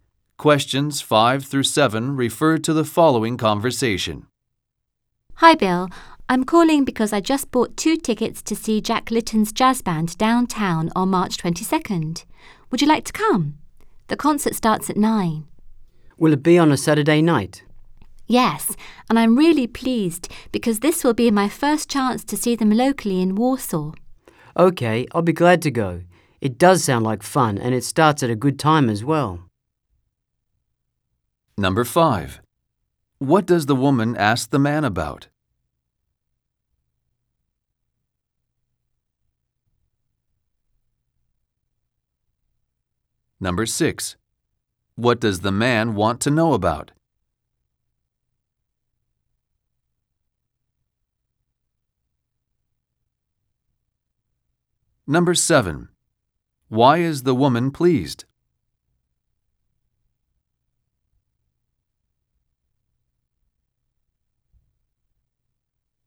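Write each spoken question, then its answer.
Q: What does the woman ask the man about?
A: Whether he would like to come to a jazz concert with her

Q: What does the man want to know about?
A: Whether the concert is on a Saturday night

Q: Why is the woman pleased?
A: It is her first chance to see the band locally in Warsaw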